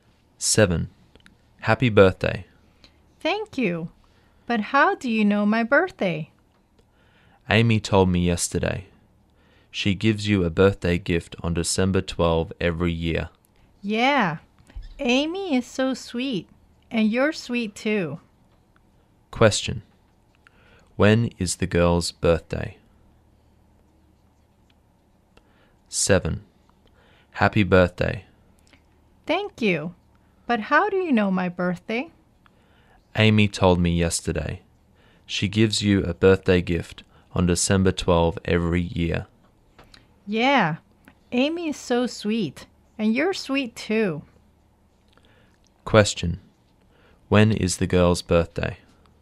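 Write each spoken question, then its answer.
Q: Question. When is the girl's birthday?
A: December 12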